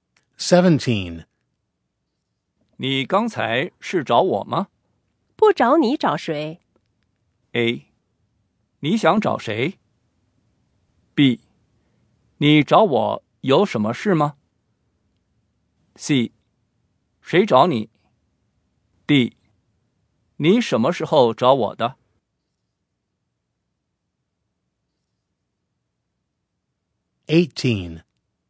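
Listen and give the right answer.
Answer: B: 你找我有什么事吗?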